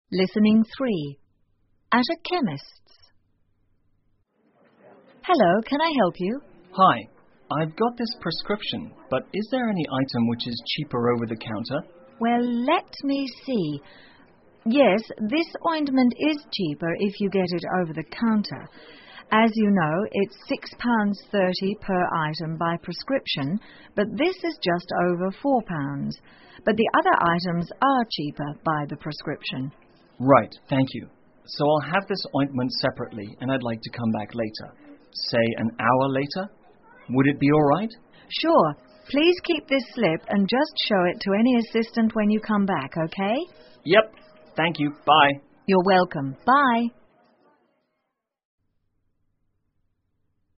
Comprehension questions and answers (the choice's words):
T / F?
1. The customer would like to get a prescription.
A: F

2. The ointment is £4 by prescription.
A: F

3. The customer would like to have the ointment separately.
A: T

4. The assistant will come back an hour later.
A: F

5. Only that assistant can handle the slip.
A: F

请再听一次对话,根据对话内容选出一个正确的答案。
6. What is the customer asking at the counter?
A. Whether the ointment is cheap.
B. Whether there are any items on the prescription that are cheaper over the counter.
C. Whether the chemist's has got the prescription.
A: Whether there are any items on the prescription that are cheaper over the counter.

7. How much is the ointment?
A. £4 by prescription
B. £4 over the counter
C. £6.30 over the counter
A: £4 over the counter

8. Why would the customer like to come back later?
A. To get the ointment cheaper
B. Because the assistant is not available right now.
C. To pick up the items on prescription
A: To pick up the items on prescription

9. What has the customer got to show when coming back?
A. Nothing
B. The ointment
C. The slip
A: The slip

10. Where is the customer going from now on?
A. To a hospital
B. To a nearby shop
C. Not stated in the conversation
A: Not stated in the conversation

请根据对话内容,选出一个正确的答案。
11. Why did the customer visit the chemist's?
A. He has got to check the price of a certain medicine.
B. His doctor prescribed some medicine.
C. The medicine he had ordered came into stock.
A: His doctor prescribed some medicine.

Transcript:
Listening 3 At a Chemist's 上药房
Shop Assistant:Hello,can I help you?
Customer:Hi,I've got this prescription but is there any item which is cheaper over the counter?
SA:Well,let me see...yes, this ointment is cheaper if you get it over the counter. As you know, it's £6.30 per item by prescription but this is just over £4.But the other items are cheaper by the prescription.
C:Right,thank you. So I'll have this ointment separately and I'd like to come back later.Say,an hour later? Would it be all right?
SA:Sure,please keep this slip and just show it to any assistant when you come back.
C: Yes,thank you. Bye.
SA: You're welcome. Bye.